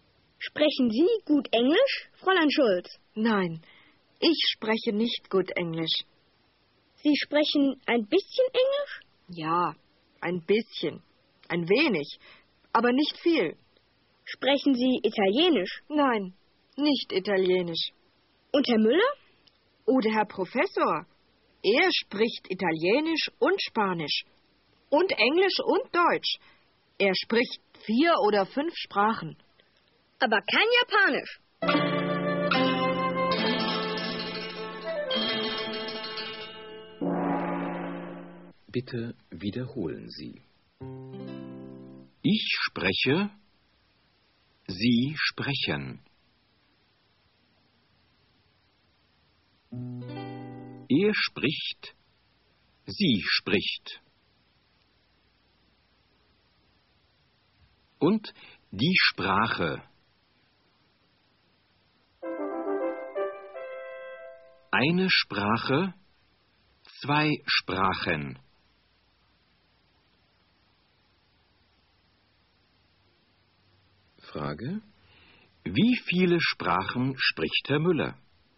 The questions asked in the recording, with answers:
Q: Wie viele Sprachen spricht Herr Müller?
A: Er spricht 4 oder 5 Sprachen.